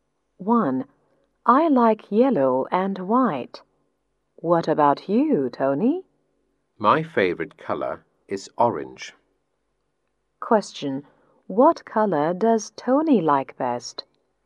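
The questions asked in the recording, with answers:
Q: What color does Tony like best?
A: Orange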